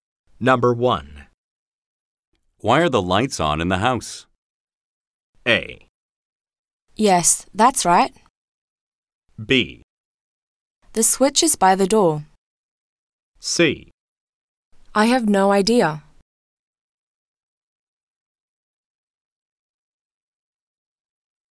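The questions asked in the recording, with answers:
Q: Why are the lights on in the house?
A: C: I have no idea.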